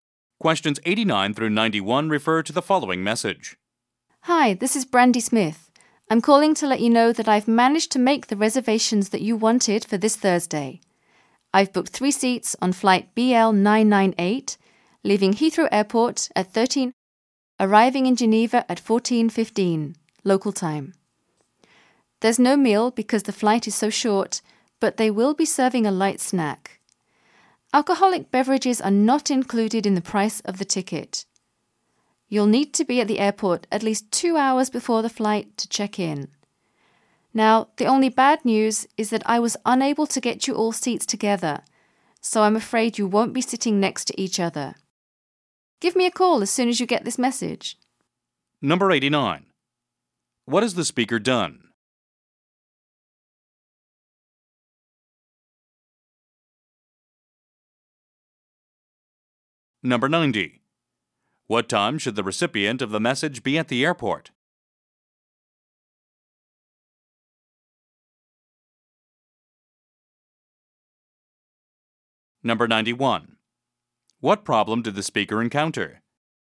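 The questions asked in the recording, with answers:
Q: What has the speaker done?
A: Made flight reservations

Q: What time should the recipient of the message be at the airport?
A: At least 2 hours before the flight (11:00)

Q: What problem did the speaker encounter?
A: She couldn't get seats together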